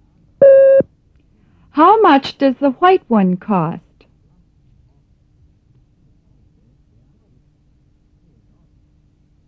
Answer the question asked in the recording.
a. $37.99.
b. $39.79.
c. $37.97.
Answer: a. $37.99.